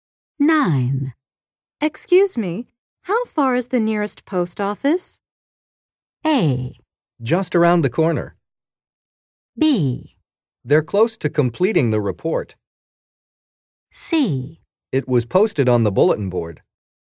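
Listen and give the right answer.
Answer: A: Just around the corner.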